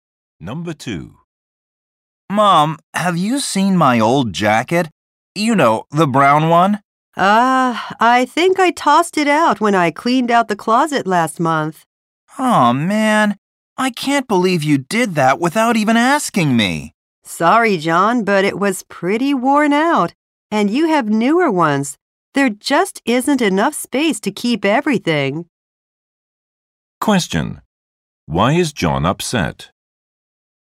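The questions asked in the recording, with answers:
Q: Why is John upset?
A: His mother threw out his old jacket without asking him.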